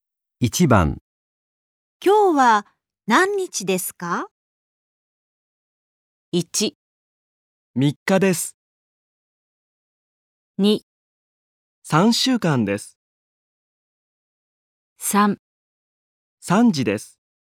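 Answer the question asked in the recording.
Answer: 1: 3日です。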